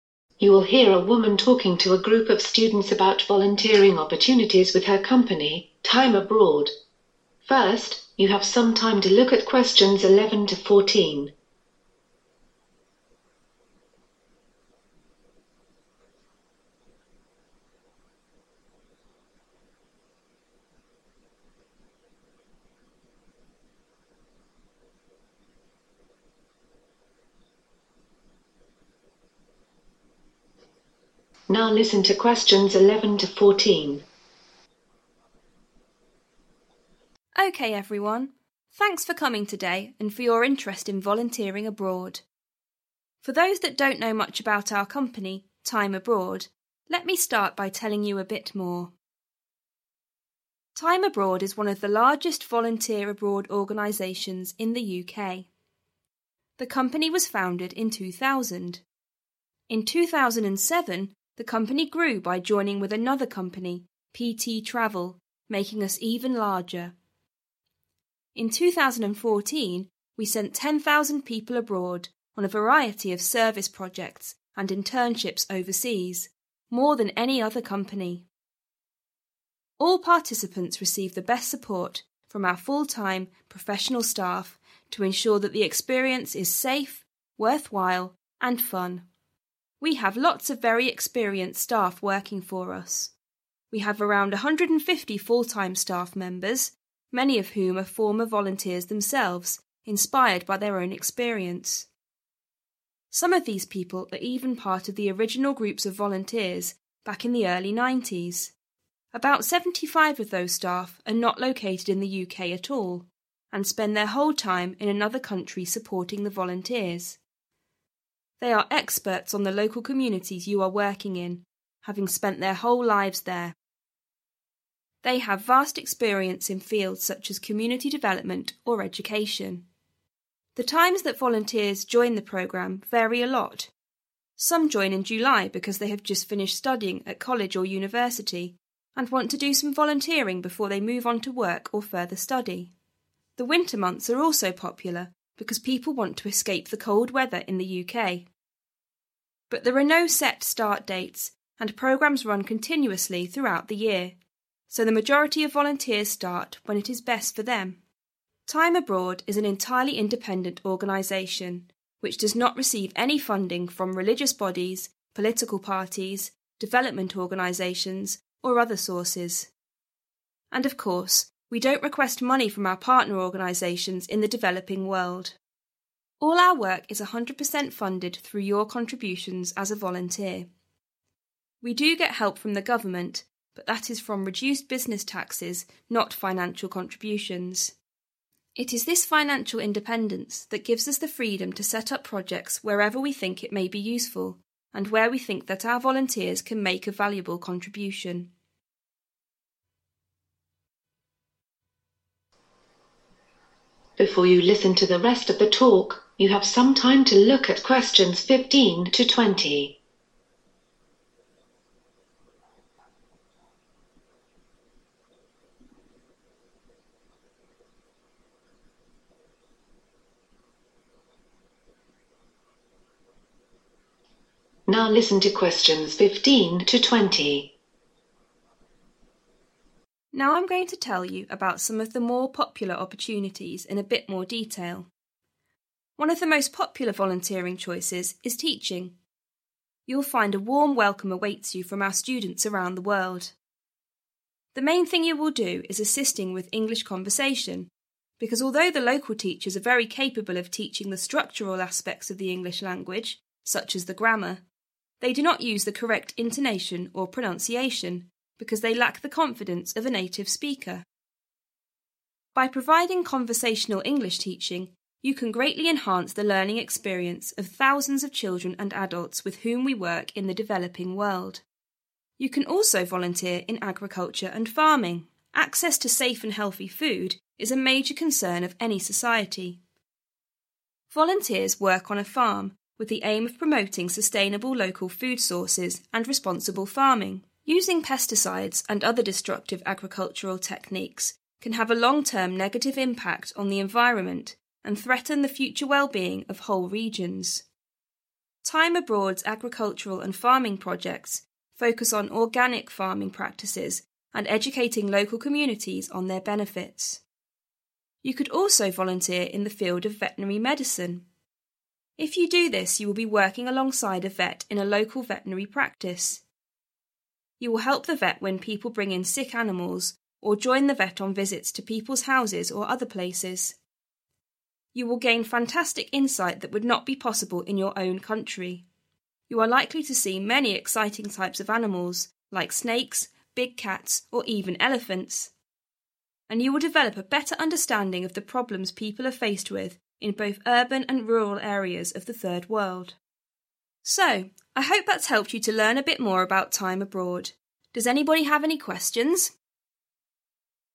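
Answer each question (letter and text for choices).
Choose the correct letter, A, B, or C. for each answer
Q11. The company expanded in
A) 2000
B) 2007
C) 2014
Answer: B) 2007

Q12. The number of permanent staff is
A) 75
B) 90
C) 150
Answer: C) 150

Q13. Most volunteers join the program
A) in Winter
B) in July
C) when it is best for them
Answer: C) when it is best for them

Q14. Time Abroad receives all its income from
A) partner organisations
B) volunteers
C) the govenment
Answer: B) volunteers

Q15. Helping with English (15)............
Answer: conversation

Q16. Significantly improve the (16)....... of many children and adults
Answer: learning experience

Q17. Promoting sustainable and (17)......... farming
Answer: responsible

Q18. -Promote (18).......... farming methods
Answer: organic

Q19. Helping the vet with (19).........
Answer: sick animals

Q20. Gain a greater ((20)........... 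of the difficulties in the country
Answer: understanding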